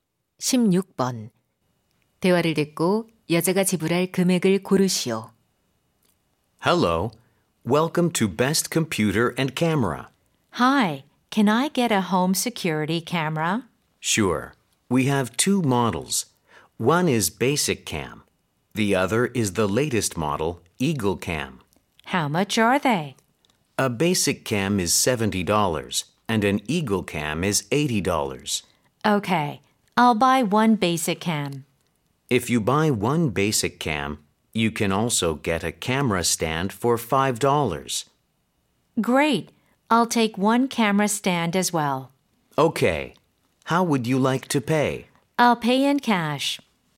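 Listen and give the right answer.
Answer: 75달러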